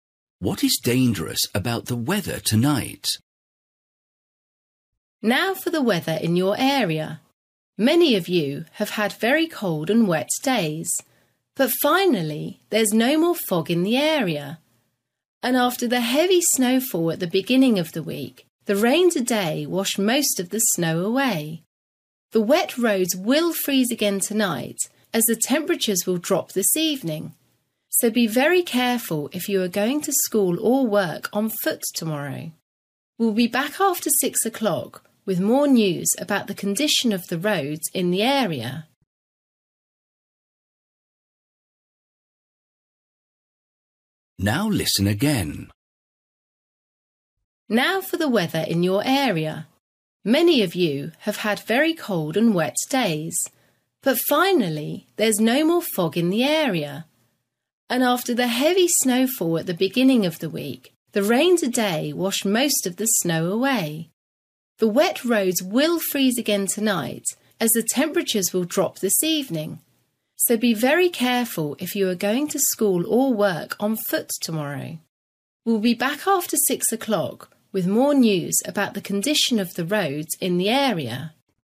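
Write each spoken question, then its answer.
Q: What is dangerous about the weather tonight?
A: Icy roads: the wet roads will freeze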